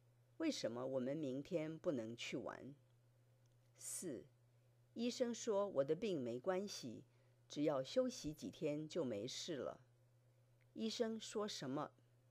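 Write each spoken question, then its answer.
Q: 医生说什么?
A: 病没关系,只要休息几天就没事了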